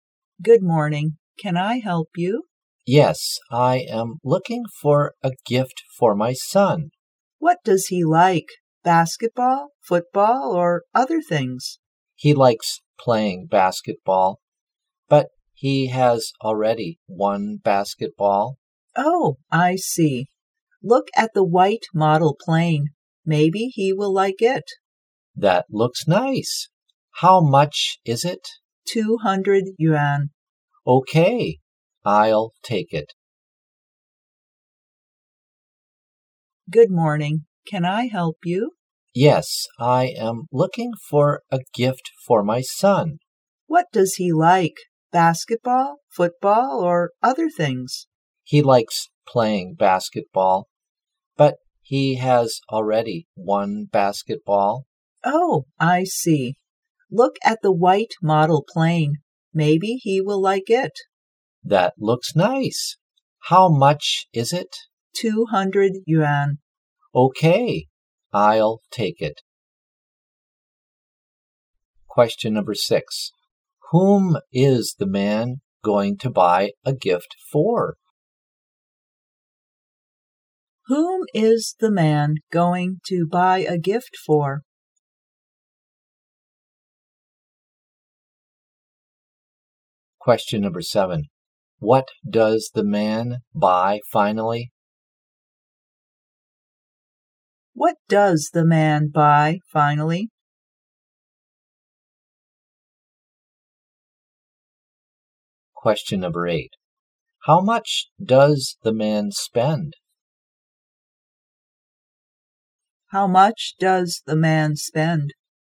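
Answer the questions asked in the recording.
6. His son
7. A white model plane
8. 200 yuan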